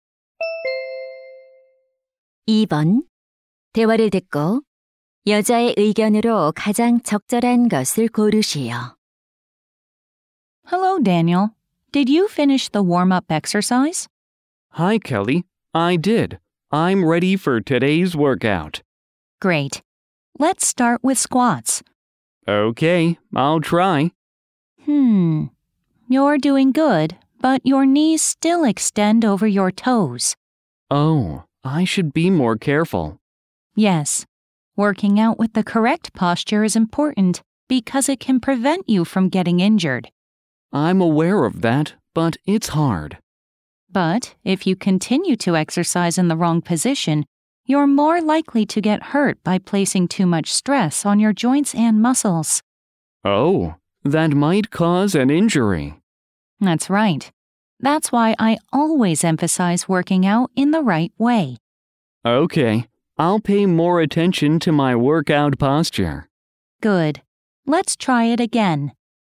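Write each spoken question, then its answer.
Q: 대화를 듣고 여자의 의견으로 가장 적절한 것을 고르시오.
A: 올바른 자세로 운동해야 부상을 예방할 수 있다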